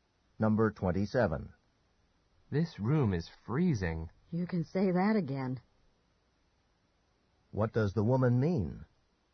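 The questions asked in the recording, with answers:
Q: What does the woman mean?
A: She agrees the room is very cold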